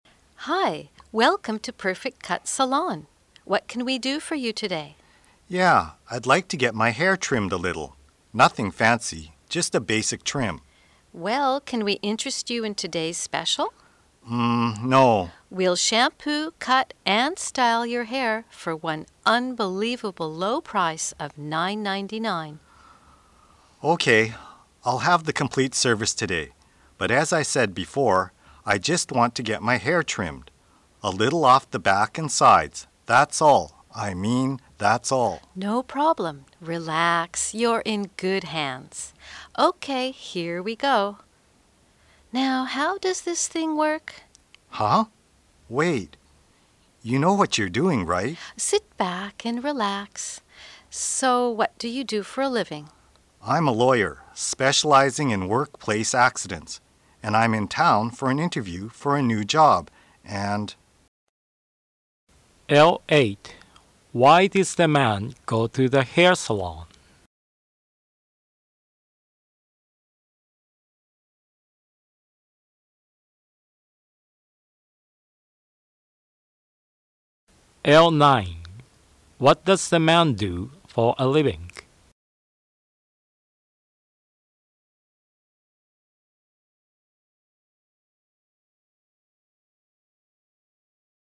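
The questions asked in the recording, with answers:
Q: Why does the man go to the hair salon?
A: To get a basic hair trim

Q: What does the man do for a living?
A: He is a lawyer specializing in workplace accidents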